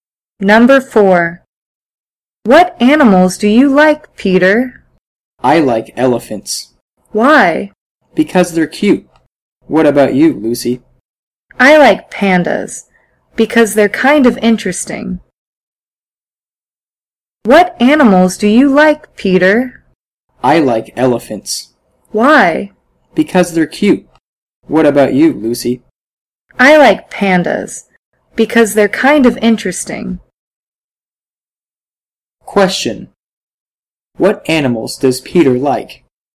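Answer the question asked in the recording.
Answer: Elephants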